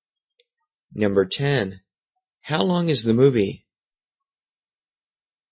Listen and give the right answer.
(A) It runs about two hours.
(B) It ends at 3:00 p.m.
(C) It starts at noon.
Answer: (A) It runs about two hours.

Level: 中级